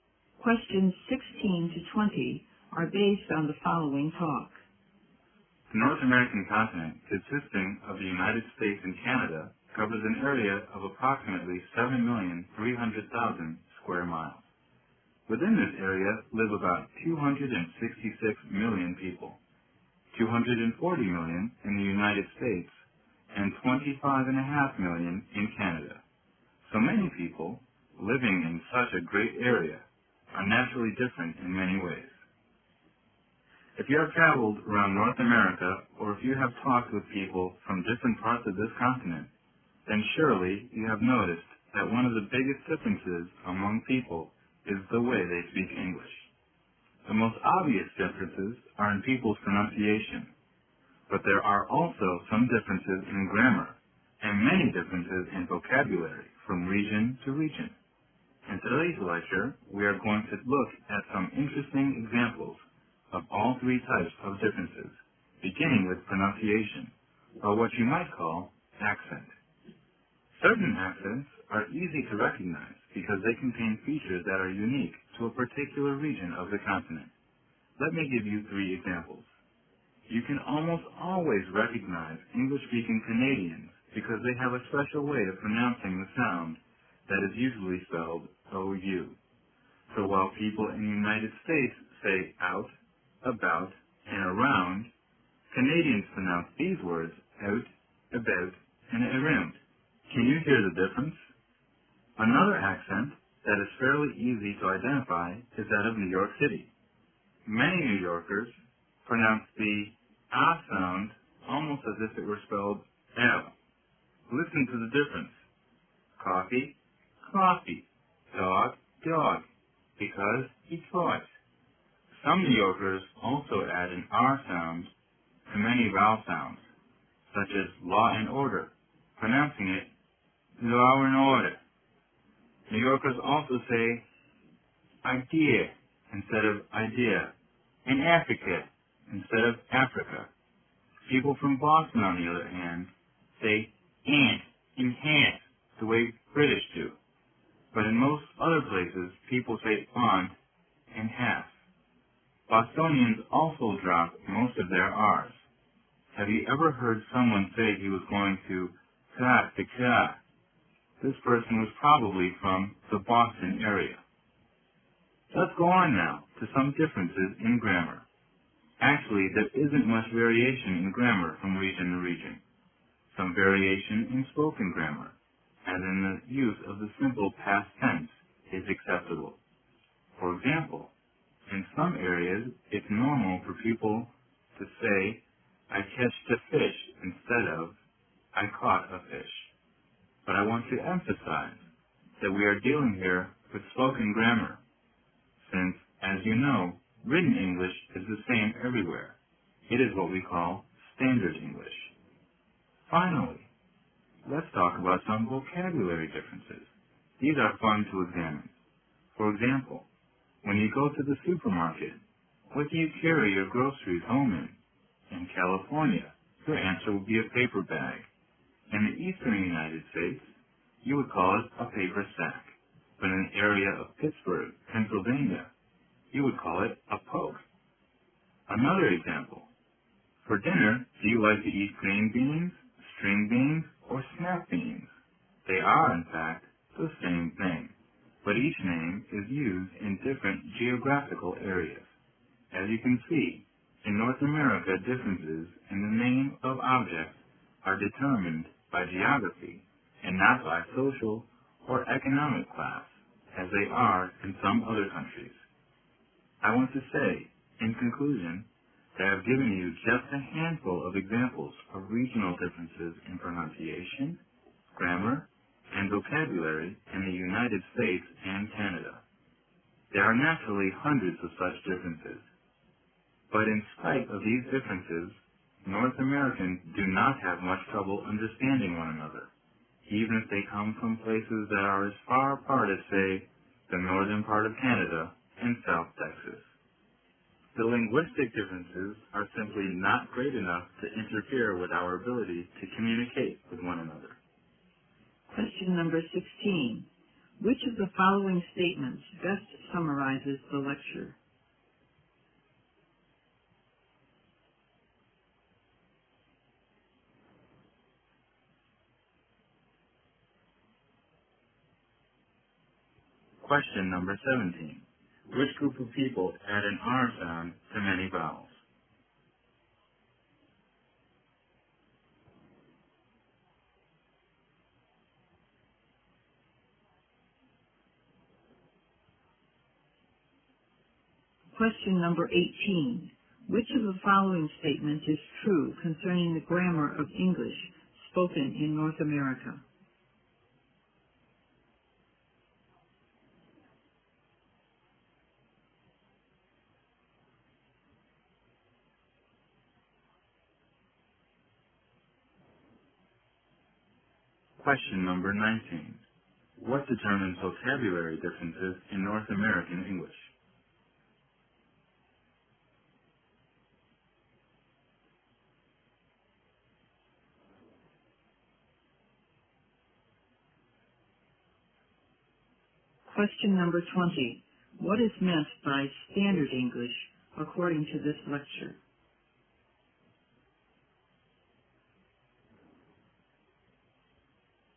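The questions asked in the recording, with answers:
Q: Which group of people add an R sound to many vowels?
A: Some New Yorkers

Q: What determines vocabulary differences in North American English?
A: Geography

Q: What is meant by standard English according to this lecture?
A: Written English, which is the same everywhere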